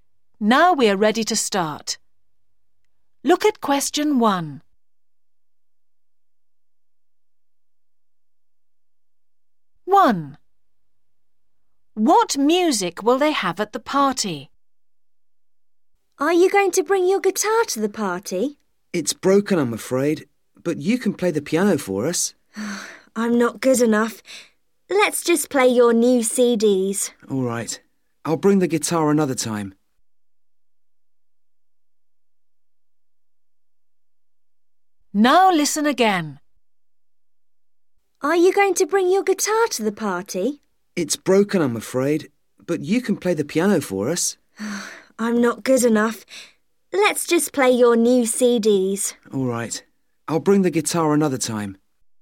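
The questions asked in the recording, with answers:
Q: What music will they have at the party?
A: new CDs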